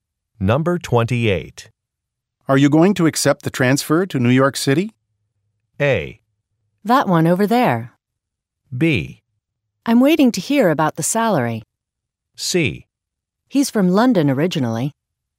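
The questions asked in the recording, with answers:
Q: Are you going to accept the transfer to New York City?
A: B: I'm waiting to hear about the salary.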